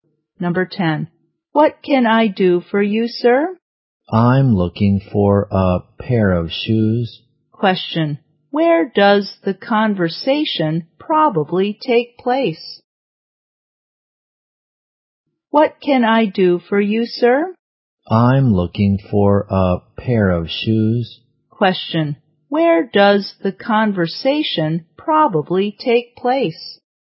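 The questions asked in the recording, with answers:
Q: Question. Where does the conversation probably take place?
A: In a shoe store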